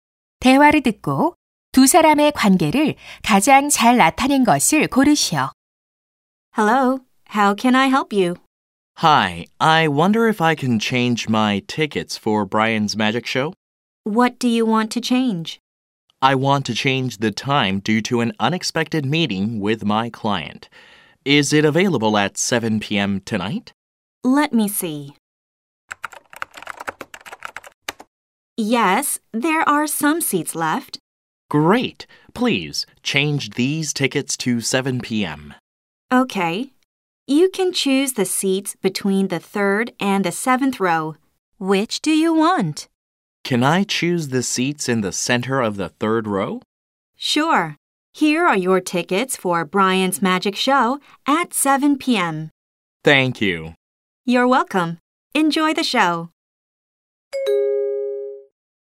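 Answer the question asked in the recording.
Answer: 매표소 직원 - 관객(고객)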